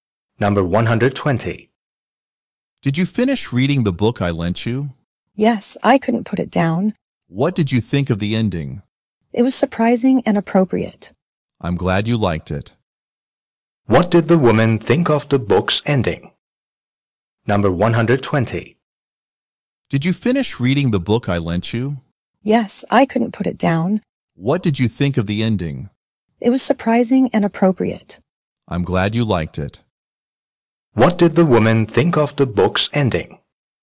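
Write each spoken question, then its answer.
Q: What did the woman think of the book's ending?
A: It was surprising and appropriate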